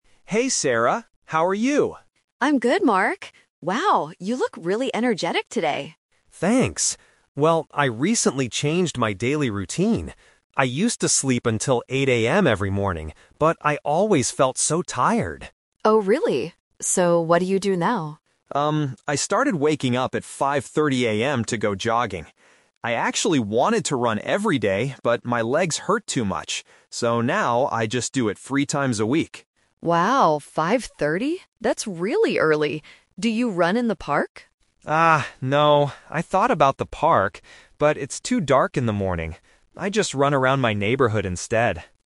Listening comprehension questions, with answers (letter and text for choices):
Listen to the conversation and choose the correct answer (A, B, or C).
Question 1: What time did the man usually wake up in the past?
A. 5:30 AM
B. 7:00 AM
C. 8:00 AM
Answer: C. 8:00 AM

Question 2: How often does the man go jogging now?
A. Every day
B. Three times a week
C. Twice a week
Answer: B. Three times a week

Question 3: Where does the man jog?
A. In the park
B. Around his neighborhood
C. At the local gym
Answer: B. Around his neighborhood

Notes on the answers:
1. The man says "I used to sleep until 8:00 AM every morning". Option A (5:30 AM) is a trap because it is his new wake-up time, not the past. Option B is not mentioned.
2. He says "I actually wanted to run every day, but... I just do it three times a week." Option A (Every day) is a trap because it was his original plan, but he changed it because his legs hurt.
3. The man says "I just run around my neighborhood instead." Option A (In the park) is a trap because the woman asks about it and he thought about it, but he decided not to go there because it's too dark. Option C is not mentioned.

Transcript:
Mark: Hey Sarah! How are you?
Sarah: I'm good, Mark. Wow, you look really energetic today.
Mark: Thanks! Well, I recently changed my daily routine. I used to sleep until 8:00 AM every morning, but I always felt so tired.
Sarah: Oh really? So, what do you do now?
Mark: Um, I started waking up at 5:30 AM to go jogging. I actually wanted to run every day, but my legs hurt too much. So now, I just do it three times a week.
Sarah: Wow, 5:30? That's really early! Do you run in the park?
Mark: Ah, no. I thought about the park, but it's too dark in the morning. I just run around my neighborhood instead.